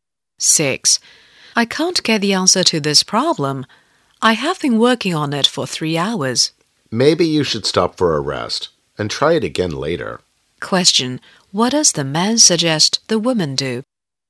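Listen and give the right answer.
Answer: Take a rest and try again later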